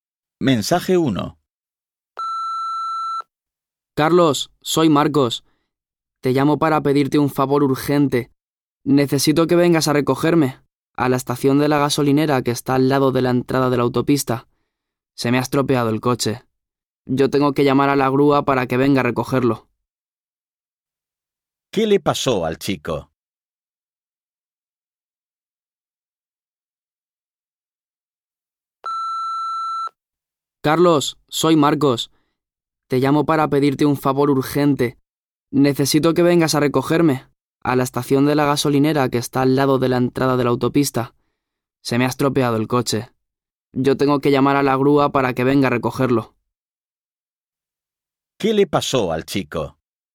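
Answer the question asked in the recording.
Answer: Se le estropeó el coche.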